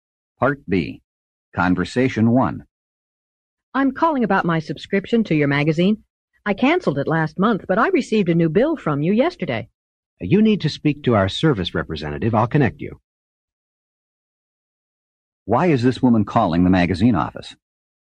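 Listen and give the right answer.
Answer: She got a new bill after canceling her subscription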